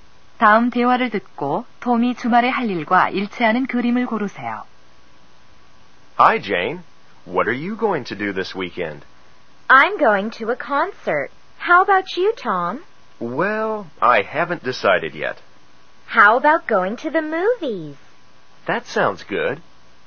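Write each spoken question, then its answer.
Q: 다음 대화를 듣고 톰이 주말에 할 일과 일치하는 그림을 고르세요.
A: 영화 보러 가기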